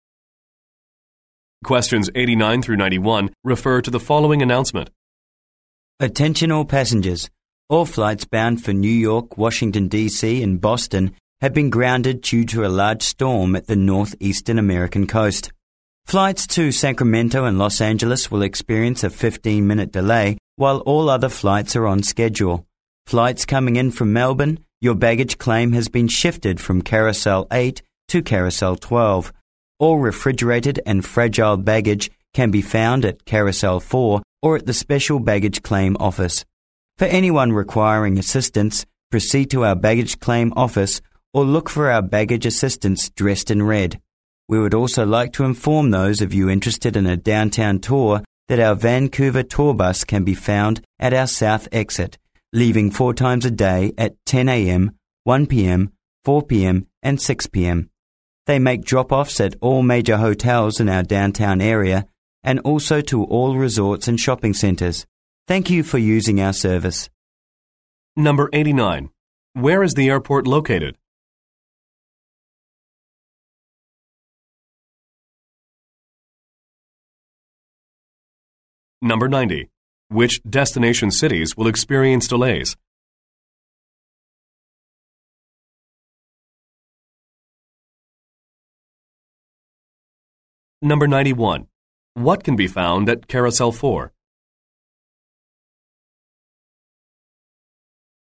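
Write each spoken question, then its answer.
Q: Where is the airport located?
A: Vancouver

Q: Which destination cities will experience delays?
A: Sacramento and Los Angeles

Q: What can be found at Carousel 4?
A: Refrigerated and fragile baggage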